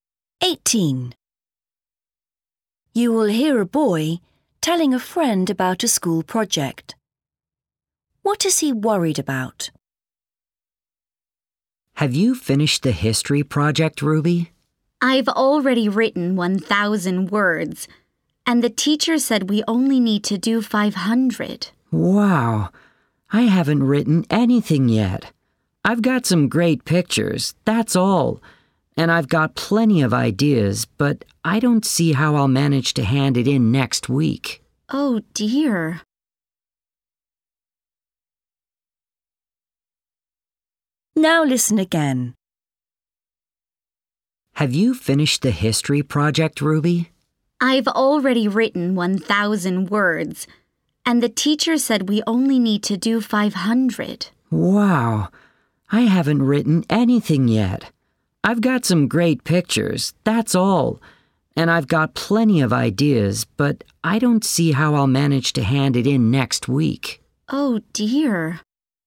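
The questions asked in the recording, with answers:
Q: What is he worried about?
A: Not finishing the project in time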